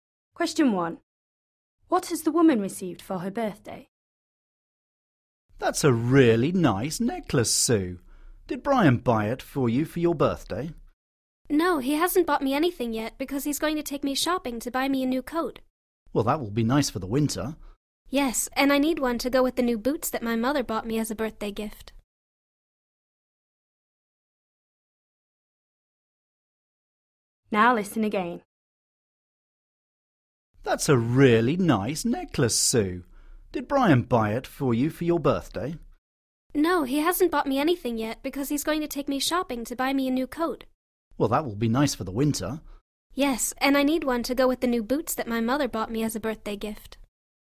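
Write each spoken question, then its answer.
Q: What has the woman received for her birthday?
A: new boots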